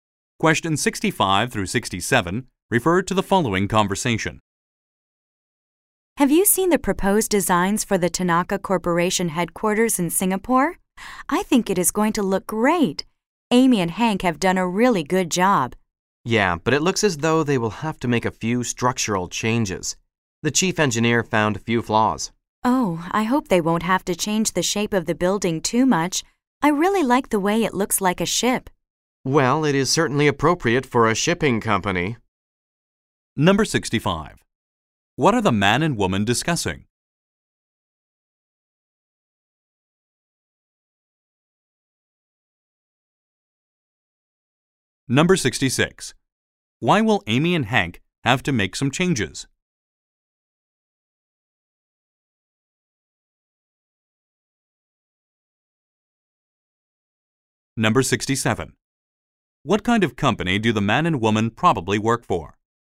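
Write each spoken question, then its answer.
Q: What are the man and woman discussing?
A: The proposed designs for the Tanaka Corporation headquarters

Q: Why will Amy and Hank have to make some changes?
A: The chief engineer found some flaws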